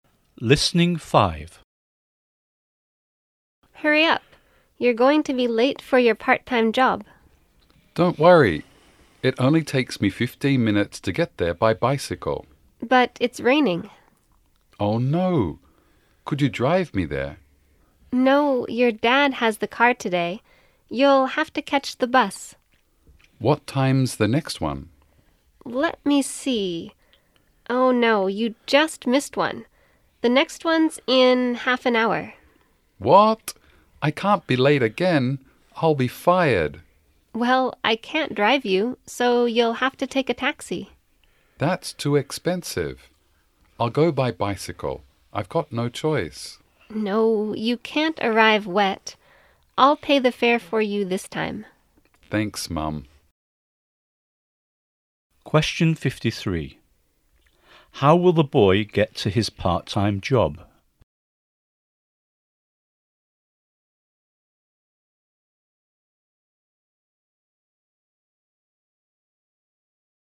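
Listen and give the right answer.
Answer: By taxi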